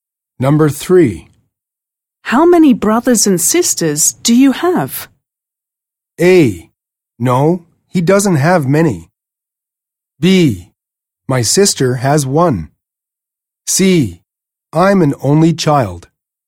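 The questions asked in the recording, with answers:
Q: How many brothers and sisters do you have?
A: C: I'm an only child.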